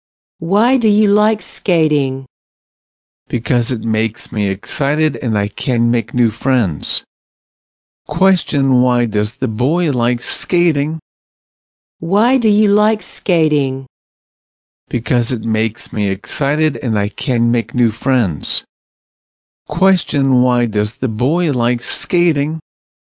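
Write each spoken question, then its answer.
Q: Question, why does the boy like skating?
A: It makes him excited and he can make new friends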